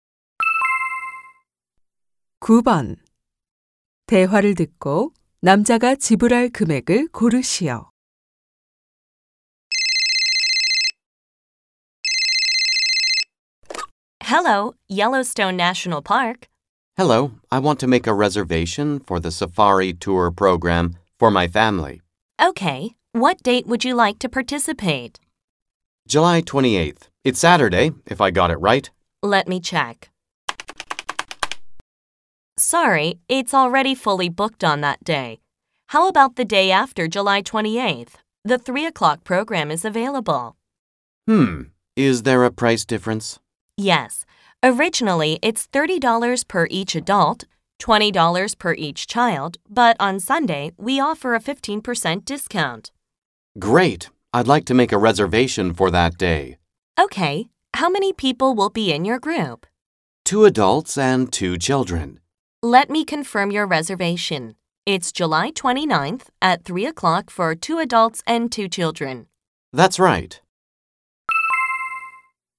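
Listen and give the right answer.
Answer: $85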